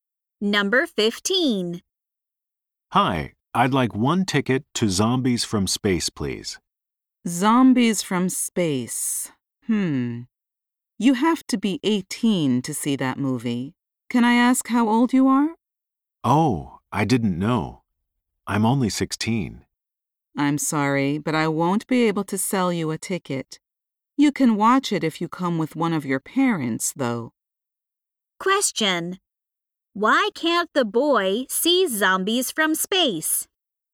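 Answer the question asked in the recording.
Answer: He is under 18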